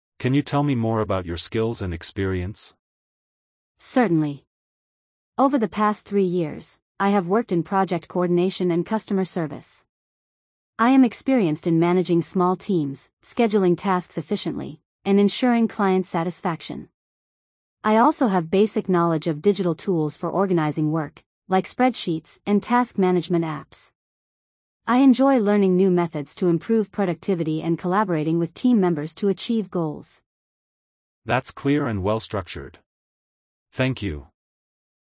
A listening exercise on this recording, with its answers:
Complete the phrases as you listen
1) Over the past three years, I have ______ in project coordination and customer service.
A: worked

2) I am experienced in ______ small teams and scheduling tasks.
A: managing

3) I also have basic knowledge ______ digital tools for organizing work.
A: of

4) I enjoy learning new methods to improve productivity and ______ with team members.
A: collaborating

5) I am experienced in managing small teams and ensuring client ______.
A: satisfaction

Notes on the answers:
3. I also have basic knowledge of digital tools for organizing work.
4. I enjoy learning new methods to improve productivity and collaborating with team members.

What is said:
Can you tell me more about your skills and experience?
Certainly! Over the past three years, I have worked in project coordination and customer service. I am experienced in managing small teams, scheduling tasks efficiently, and ensuring client satisfaction. I also have basic knowledge of digital tools for organizing work, like spreadsheets and task management apps. I enjoy learning new methods to improve productivity and collaborating with team members to achieve goals.
That's clear and well-structured. Thank you.